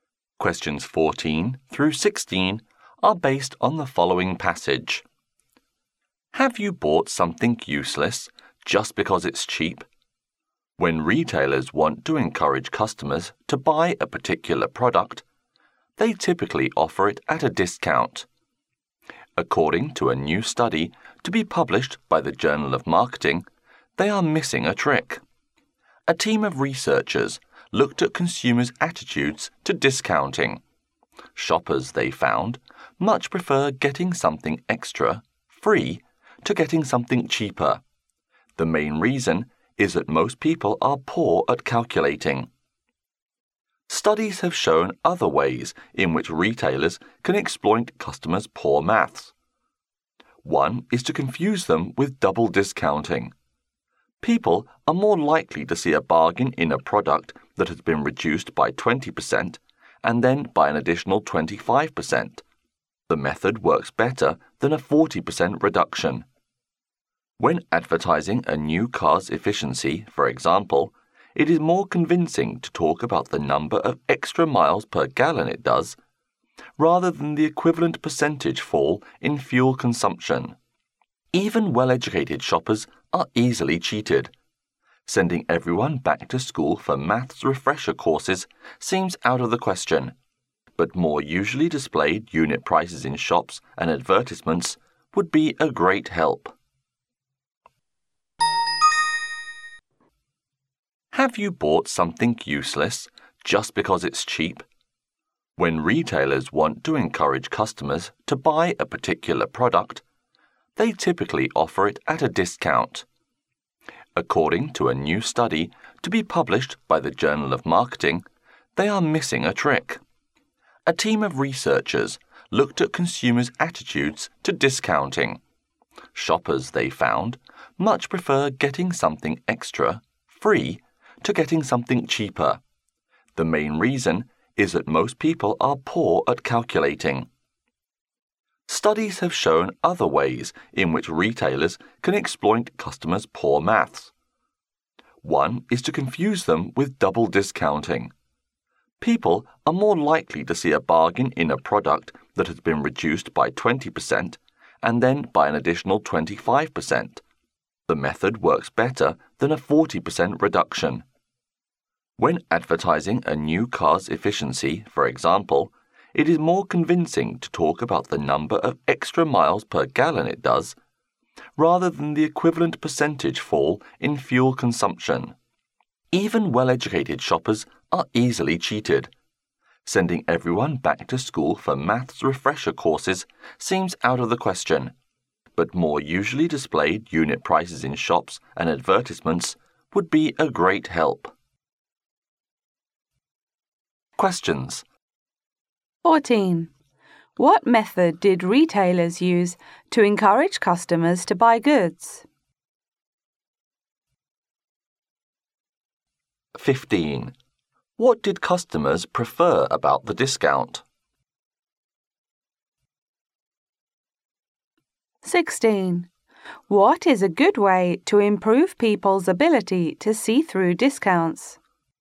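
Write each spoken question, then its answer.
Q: What method did retailers use to encourage customers to buy goods?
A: Offering products at a discount

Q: What did customers prefer about the discount?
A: Getting something extra for free

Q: What is a good way to improve people's ability to see through discounts?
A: Showing unit prices in shops and advertisements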